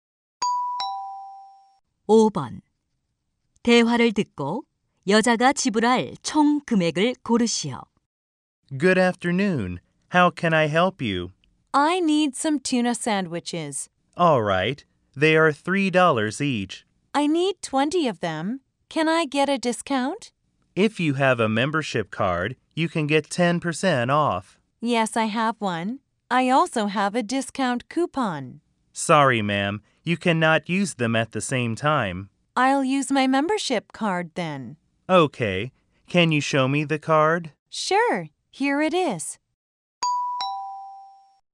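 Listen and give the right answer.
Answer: $54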